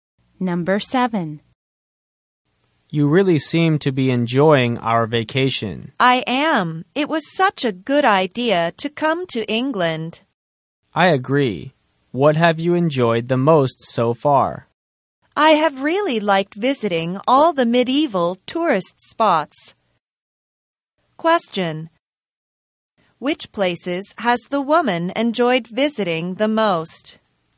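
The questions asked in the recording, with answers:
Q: Which places has the woman enjoyed visiting the most?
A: The medieval tourist spots in England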